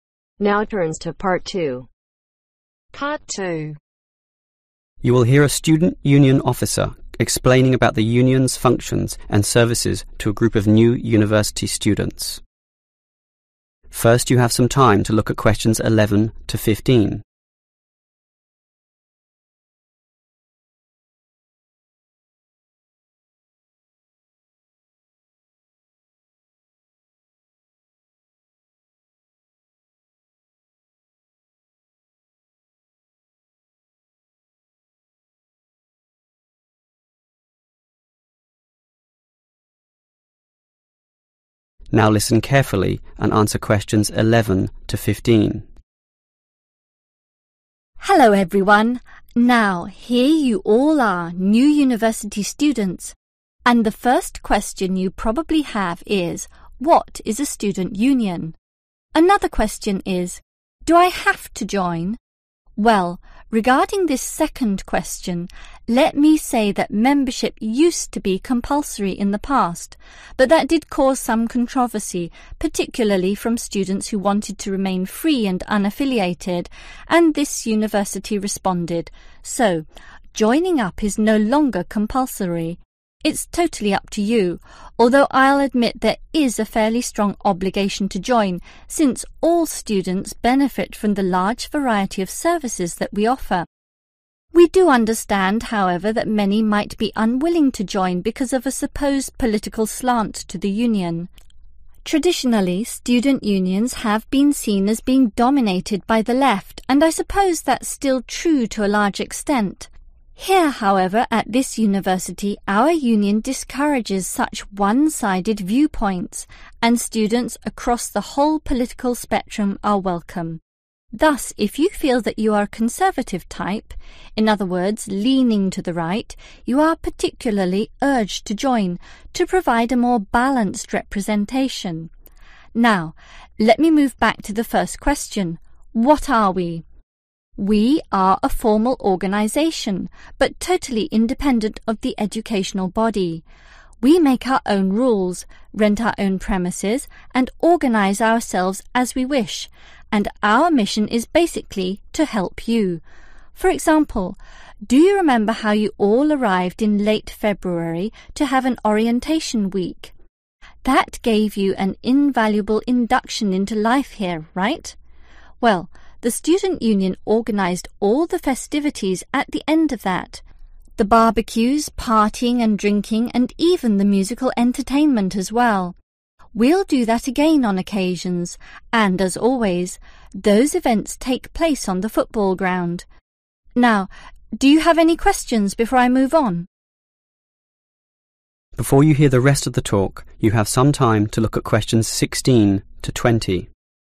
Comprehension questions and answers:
Answer the Questions below. Write NO MORE THAN TWO WORDS for each answer.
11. What resulted from compulsory membership ?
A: (some) Controversy

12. The student union has many what ?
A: Services

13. who controls many student unions ?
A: The left

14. When did the Orientation Week begin ?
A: Late February

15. Where are the festivities held ?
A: Football ground